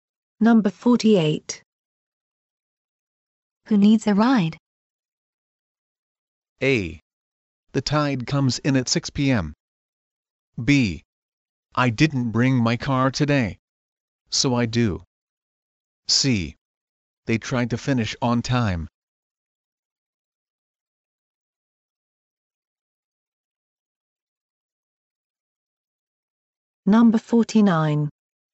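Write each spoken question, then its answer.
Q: Who needs a ride?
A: B: I didn't bring my car today.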